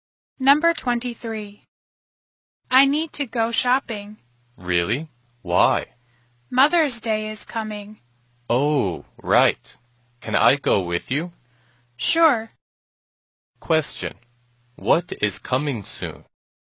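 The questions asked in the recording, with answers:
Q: Question. What is coming soon?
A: Mother's Day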